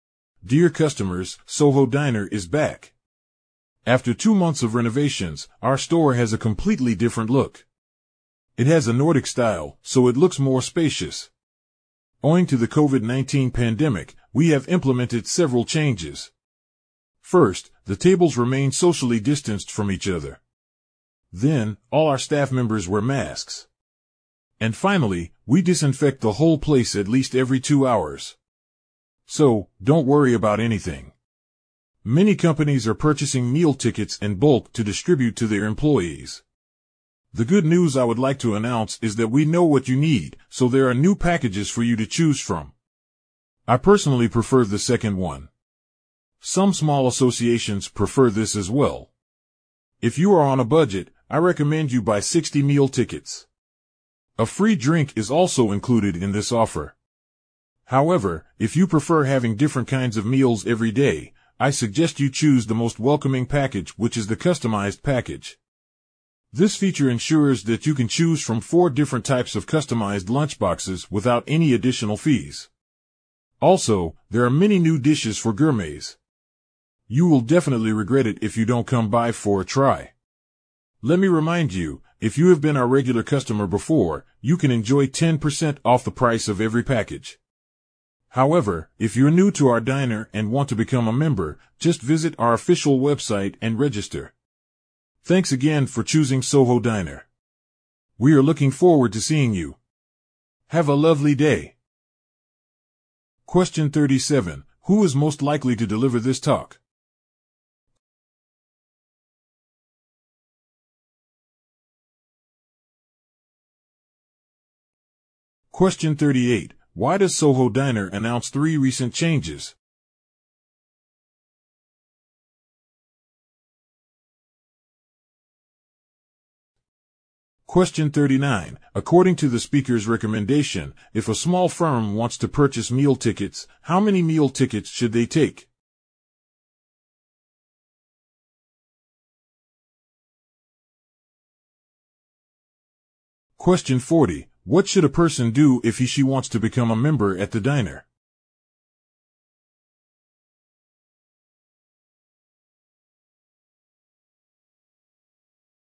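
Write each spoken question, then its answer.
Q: Why does Soho Diner announce 3 recent changes?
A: Because of the COVID-19 pandemic, so that customers don't need to worry

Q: What should a person do if he/she wants to become a member at the diner?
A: Visit the official website and register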